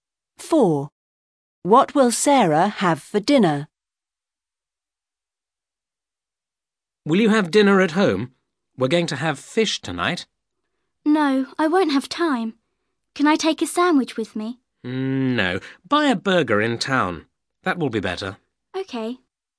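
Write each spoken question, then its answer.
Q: What will Sarah have for dinner?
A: A burger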